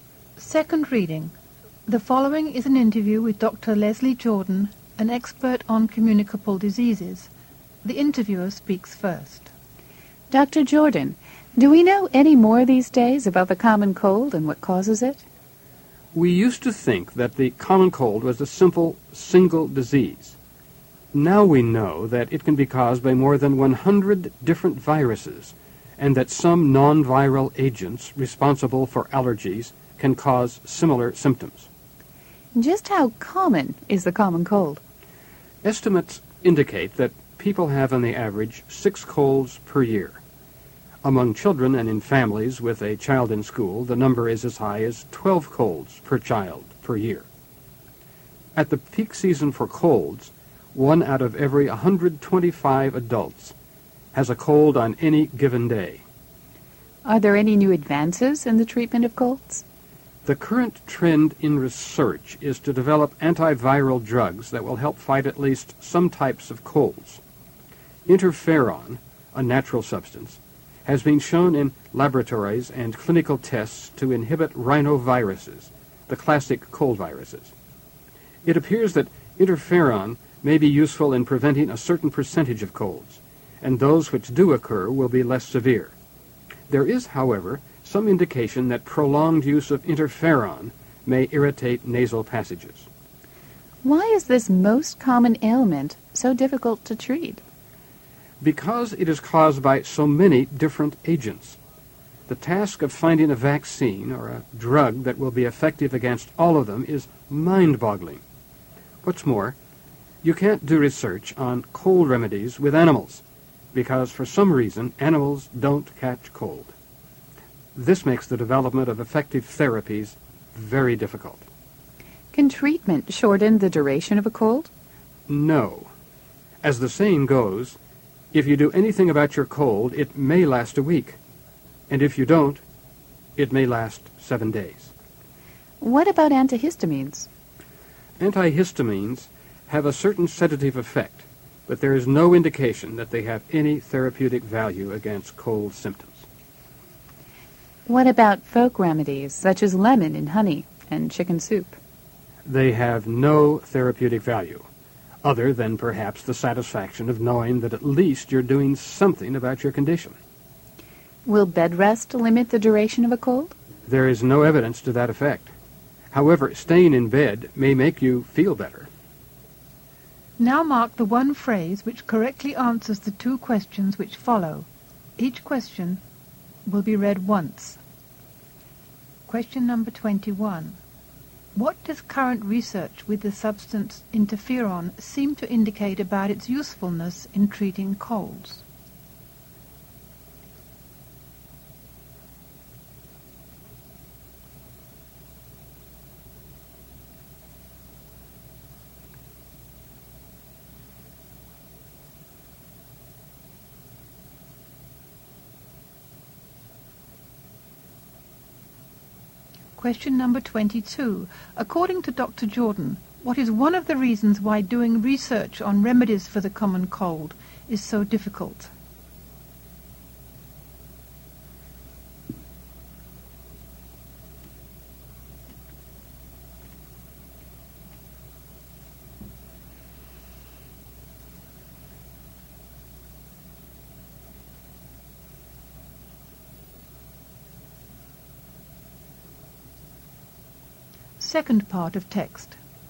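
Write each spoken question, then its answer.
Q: What does current research with the substance interferon seem to indicate about its usefulness in treating colds?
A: It may prevent some colds and make the others less severe

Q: Jordan, what is one of the reasons why doing research on remedies for the common cold is so difficult?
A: Colds have many different causes, and animals don't catch colds, so research can't be done on them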